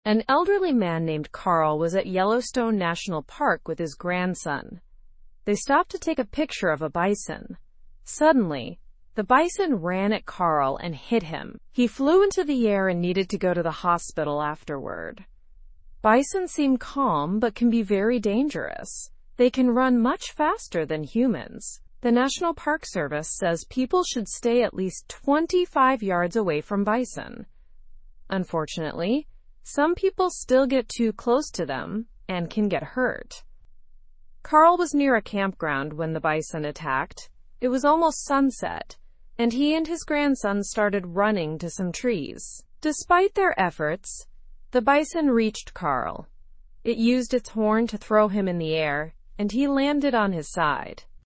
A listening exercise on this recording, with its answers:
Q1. Who was with Carl during the incident?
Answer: His grandson was with him.

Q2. What caused the bison to run at Carl?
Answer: It happened suddenly while they were taking a photo.

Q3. How fast can bison run compared to humans?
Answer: Bison can run much faster than humans.

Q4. What distance should people keep from bison?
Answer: People should stay at least 25 yards away.

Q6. What did Carl attempt to do to escape the bison?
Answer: Carl and his grandson tried to run to some trees.

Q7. What was Carl's condition after the bison attack?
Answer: He was hurt and needed to go to the hospital.

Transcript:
An elderly man named Carl was at Yellowstone National Park with his grandson. They stopped to take a picture of a bison. Suddenly, the bison ran at Carl and hit him. He flew into the air and needed to go to the hospital afterward.
Bison seem calm but can be very dangerous. They can run much faster than humans. The National Park Service says people should stay at least 25 yards away from bison. Unfortunately, some people still get too close to them and can get hurt.
Carl was near a campground when the bison attacked. It was almost sunset, and he and his grandson started running to some trees. Despite their efforts, the bison reached Carl.

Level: Level 2